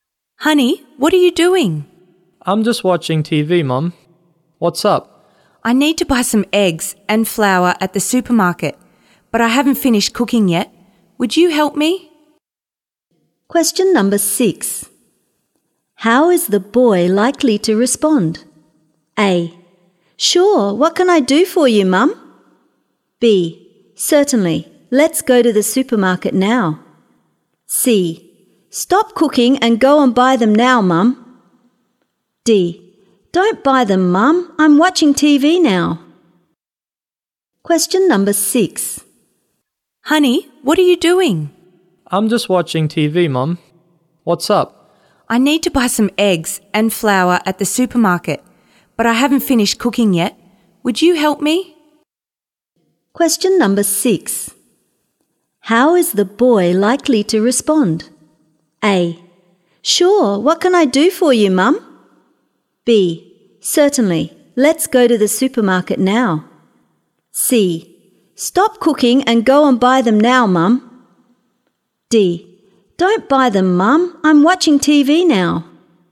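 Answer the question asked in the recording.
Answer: A: Sure, what can I do for you, Mum?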